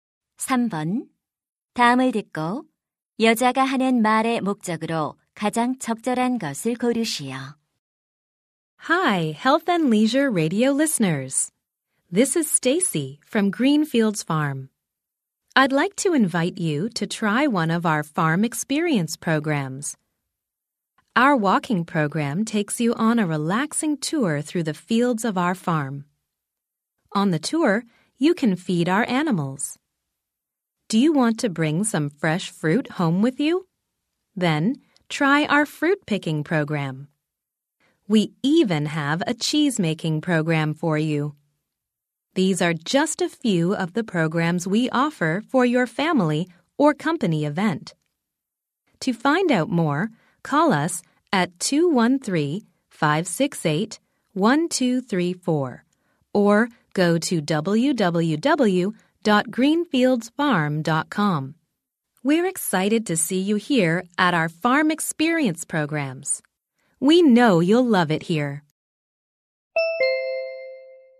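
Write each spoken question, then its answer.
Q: 다음을 듣고 여자가 하는 말의 목적으로 가장 적절한 것을 고르시오.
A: 농장 체험 프로그램을 홍보하려고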